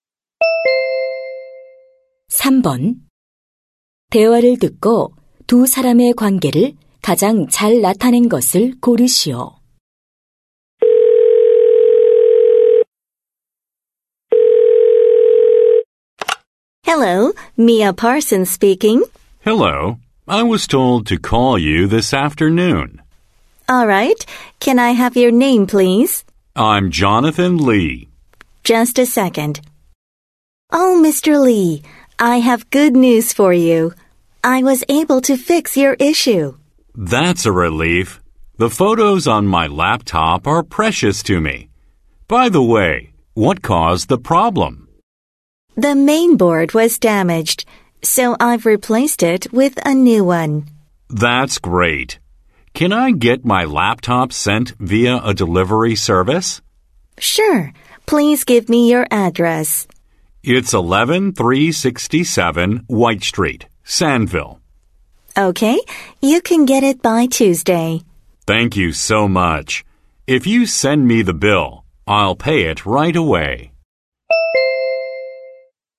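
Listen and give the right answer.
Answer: 노트북 수리 기사 - 고객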